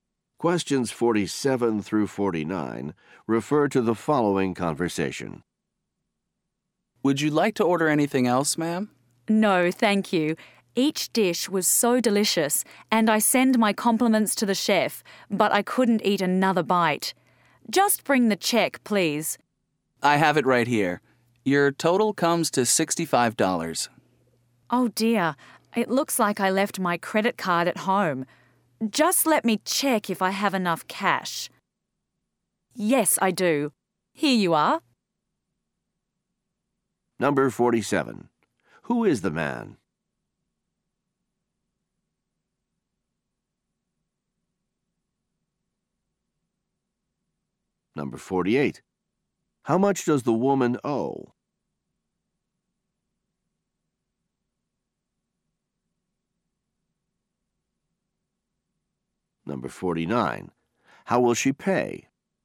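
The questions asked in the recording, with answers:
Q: Who is the man?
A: A waiter

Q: How much does the woman owe?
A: $65

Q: How will she pay?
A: In cash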